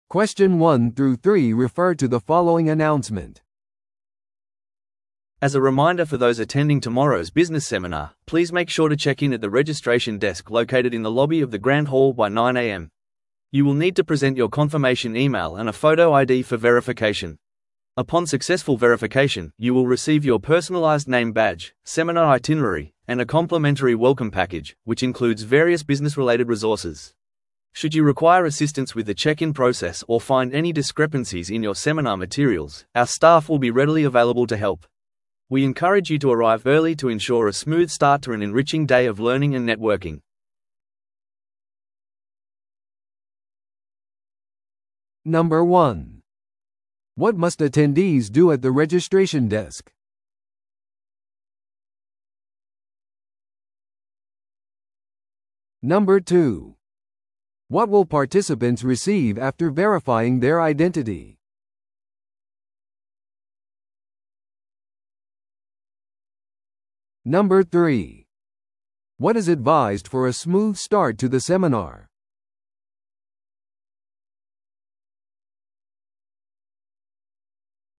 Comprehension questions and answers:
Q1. What must attendees do at the registration desk?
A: 確認メールと写真付きIDを提示する

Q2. What will participants receive after verifying their identity?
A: 名札とセミナー資料

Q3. What is advised for a smooth start to the seminar?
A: 早めに到着する

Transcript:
As a reminder for those attending tomorrow's business seminar, please make sure to check in at the registration desk located in the lobby of the Grand Hall by 9am. You will need to present your confirmation email and a photo ID for verification. Upon successful verification, you will receive your personalized name badge, seminar itinerary, and a complimentary welcome package, which includes various business-related resources. Should you require assistance with the check-in process or find any discrepancies in your seminar materials, our staff will be readily available to help. We encourage you to arrive early to ensure a smooth start to an enriching day of learning and networking.